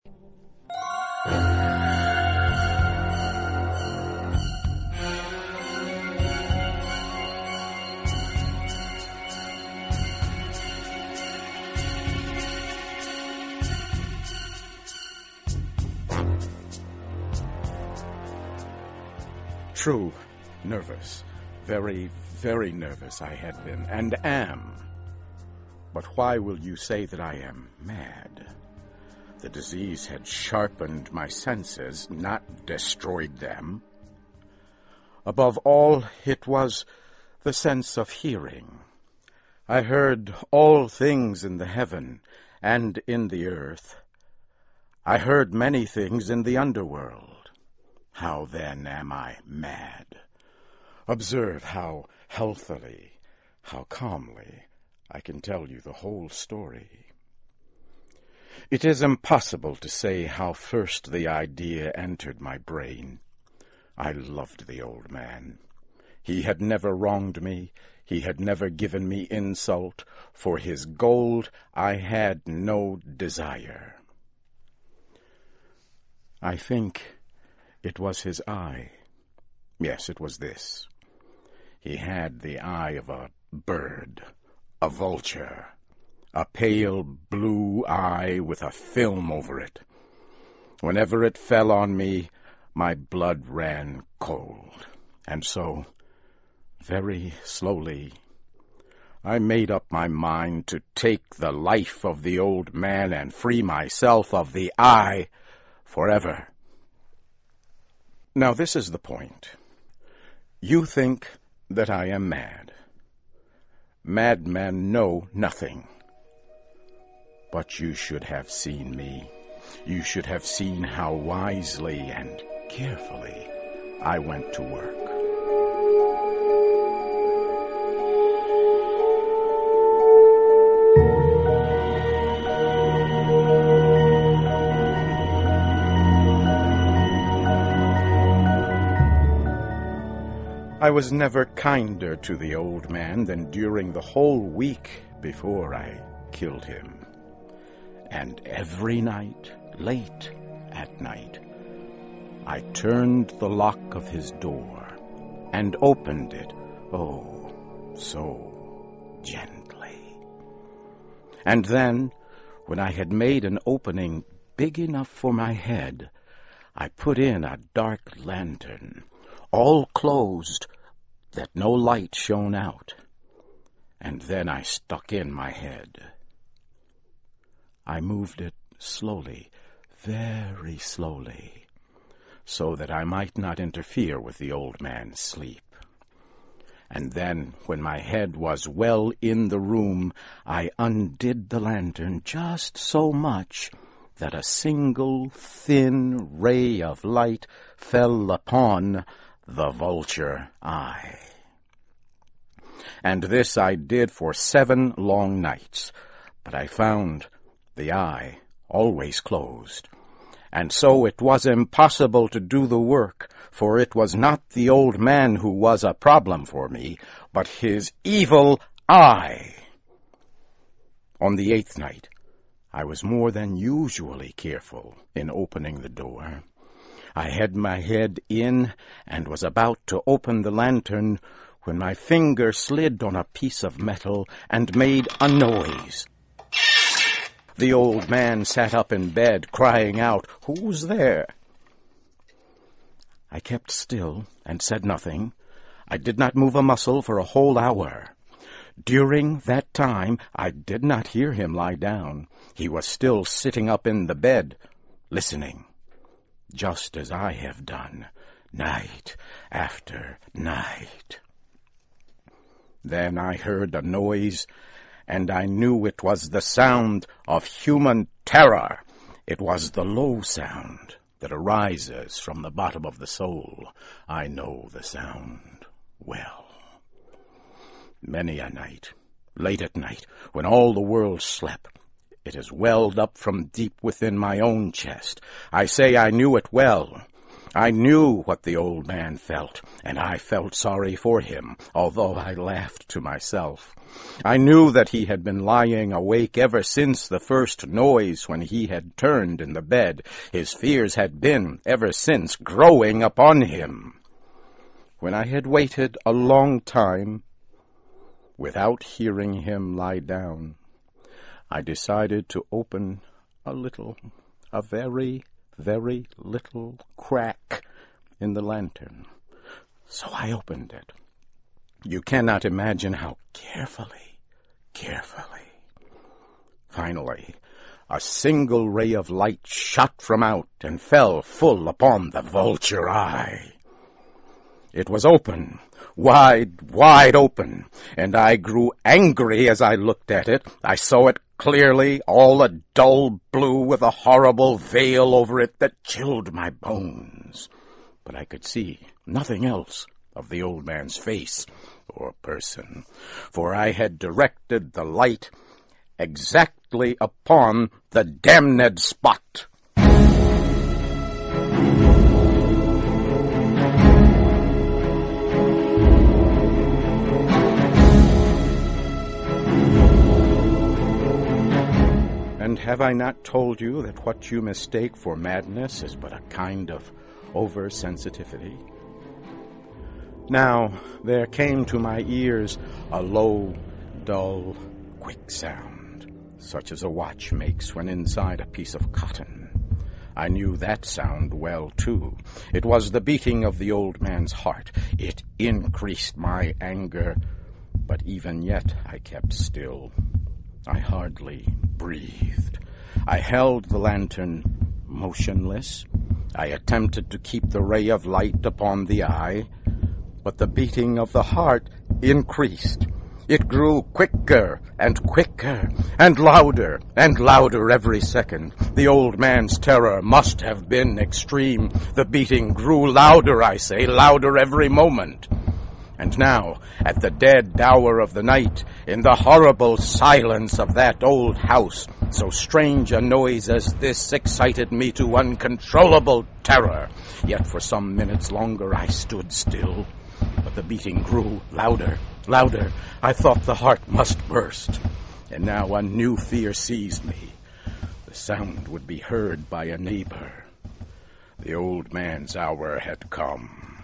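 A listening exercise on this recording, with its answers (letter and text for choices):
Listen carefully and for questions 1-6, choose the answer (A, B, C or D) which you think best completes each question.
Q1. What had the madness done for the narrator's senses?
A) sharpened them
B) destroyed them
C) dulled them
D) nothing of note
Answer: A) sharpened them

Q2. What was the reason that the narrator killed the old man?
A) his gold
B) his house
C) he insulted the narrator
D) his eye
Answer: D) his eye

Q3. During the week before the narrator killed the old man, how did he act towards him?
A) cruel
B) kind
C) indifferent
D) it never says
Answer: B) kind

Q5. For how long did the narrator look in upon the old man?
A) five nights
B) seven nights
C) six nights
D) eight nights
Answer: B) seven nights

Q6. Why couldn't the narrator kill the old man on the first night?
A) there was someone else in the house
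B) the eye was closed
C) he didn't have the courage then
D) the old man wasn't asleep by midnight on the first night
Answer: B) the eye was closed

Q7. What did the narrator do by accident as a result waking the old man?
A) his thumb slipped on the lantern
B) he slipped and fell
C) he sneezed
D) he coughed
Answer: A) his thumb slipped on the lantern

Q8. What did the old man cry out when awakened?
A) "What was that?"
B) "Who is it?"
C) "Is anyone there?"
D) "Who's there?"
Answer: D) "Who's there?"

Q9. What was the low, dull, quick sound that the narrator heard?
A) his own heartbeat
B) the clock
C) his watch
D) the old man's heartbeat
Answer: D) the old man's heartbeat

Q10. The beating grew louder – what was the new anxiety that seized the narrator at this point?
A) the sound being heard by neighbors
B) the noise waking up the old man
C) there was no anxiety at this time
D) someone coming in the house to investigate the noise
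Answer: A) the sound being heard by neighbors

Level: CAE - Certificate in Advanced English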